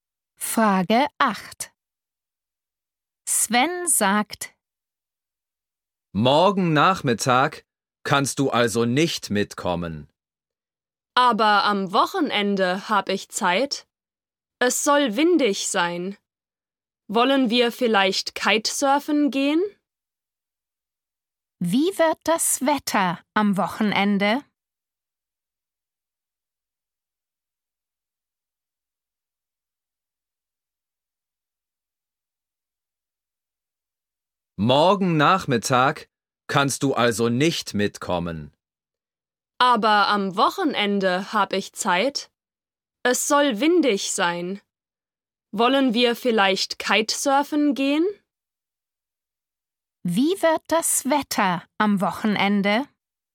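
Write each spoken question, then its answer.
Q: Wie wird das Wetter am Wochenende?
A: windig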